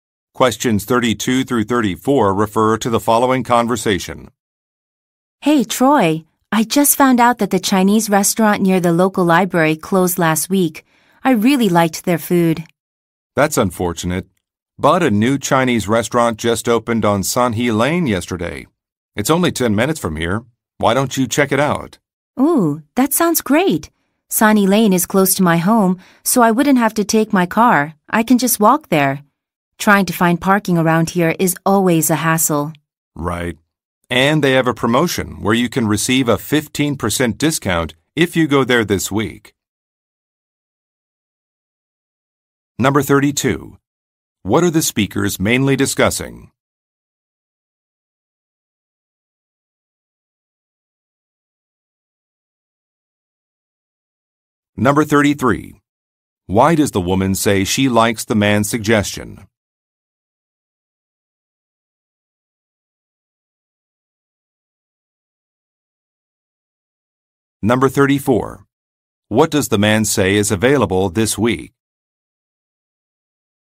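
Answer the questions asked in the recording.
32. A new Chinese restaurant
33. She can walk there instead of driving
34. A 15% discount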